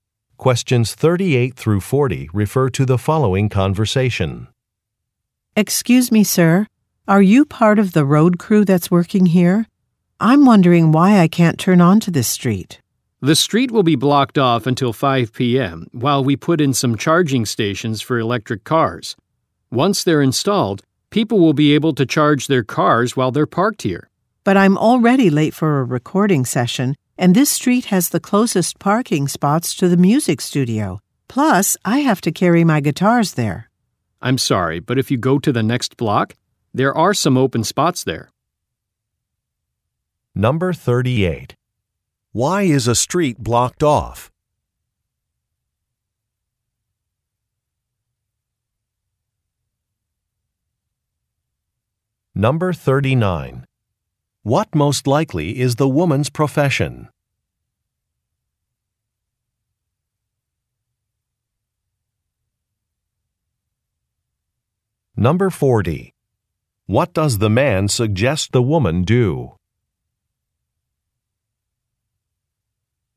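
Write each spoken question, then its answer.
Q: Why is a street blocked off?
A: Charging stations for electric cars are being installed

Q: What most likely is the woman's profession?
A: Musician

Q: What does the man suggest the woman do?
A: Park on the next block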